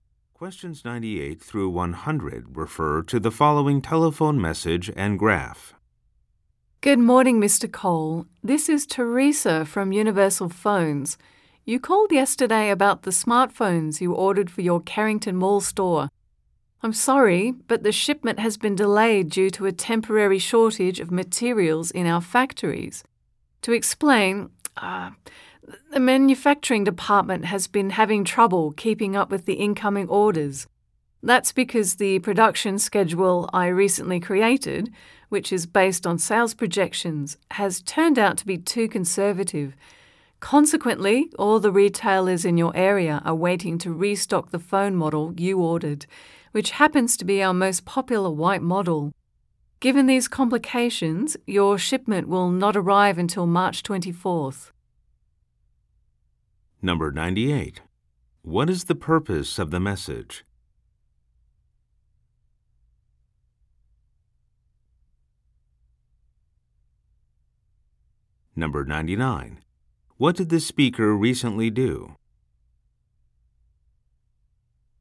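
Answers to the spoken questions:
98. To report a delayed shipment
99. Created a production schedule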